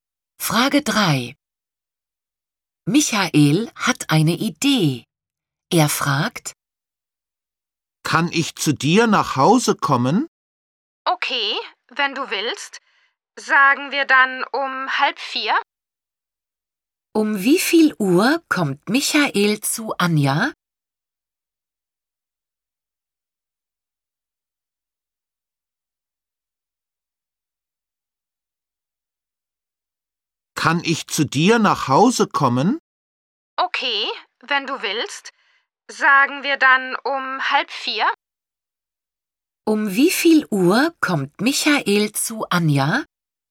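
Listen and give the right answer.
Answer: Um 3:30 (halb vier)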